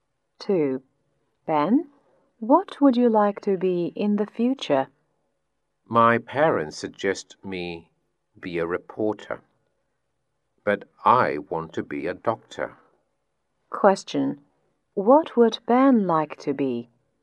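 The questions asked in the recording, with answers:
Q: What would Ben like to be?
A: A doctor.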